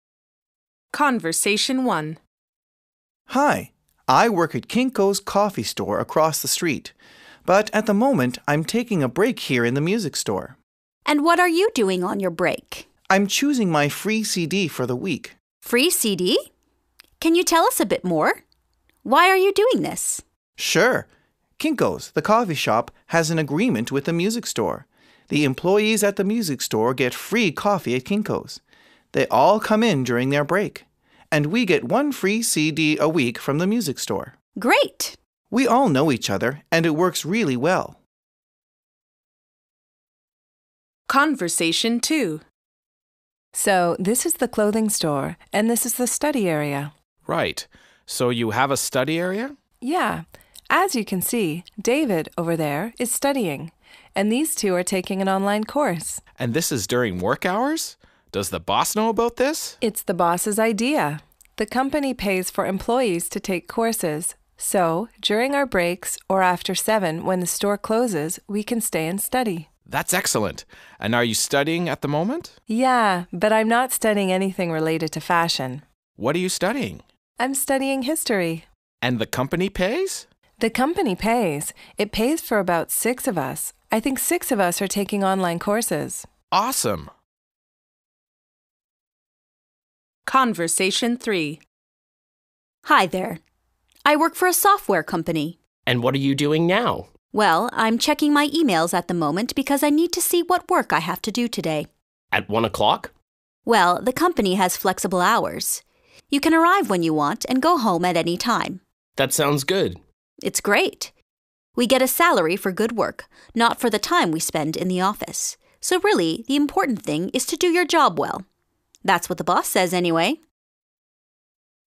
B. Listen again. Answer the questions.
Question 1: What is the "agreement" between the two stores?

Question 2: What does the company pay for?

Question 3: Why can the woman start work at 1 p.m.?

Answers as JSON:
{"1": "The employees at the music store get free coffee at Kinko's.", "2": "It pays for employees to take courses.", "3": "Because the company has flexible hours."}

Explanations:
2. The company pays for employees to take courses. So, during our breaks or after seven when the store closes, we can stay on and study.
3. Well, the company has flexible hours. You can arrive when you want and go home at any time.

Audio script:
I work at Kinko's coffee store across the street. But, at the moment I'm taking a break here in the music store.
I: And what are you doing on your break?
M: I'm choosing my free CD for the week.
I: Free CD? Can you tell us a bit more? Why are you doing this?
M: Sure. Kinko's, the coffee shop, has an agreement with the music store. The employees at the music store get free coffee at Kinko's. They all come in during their break. And we get one free CD a week from the music store.
I: Great!
M: We all know each other, and it works really well.
Conversation 2
W: So, this is the clothing store. And this is the study area.
I: Right. So you have a study area?
W: Yeah. As you can see, David, over there, is studying. And these two are taking an online course.
I: And this is during work hours? Does the boss know about this?
W: It's the boss' idea. The company pays for employees to take courses. So, during our breaks or after seven when the store closes, we can stay on and study.
I: That's excellent. And are you studying at the moment?
W: Yeah, but I'm not studying anything related to fashion.
I think six of us are taking online courses.
I: Awesome!
Conversation 3
E: Hi there. I work for a software company.
E: Well, I'm checking my emails at the moment because I need to see what work I have to do today.
I: At one o'clock?
E: Well, the company has flexible hours. You can arrive when you want and go home at any time.
I: That sounds good.
E: It's great. We get a salary for good work, not for the time we spend in the office. So, really, the important thing is to do your job well. That's what the boss says, anyway!